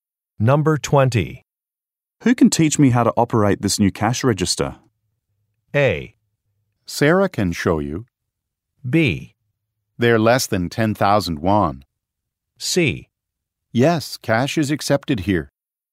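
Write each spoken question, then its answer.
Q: Who can teach me how to operate this new cash register?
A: A: Sarah can show you.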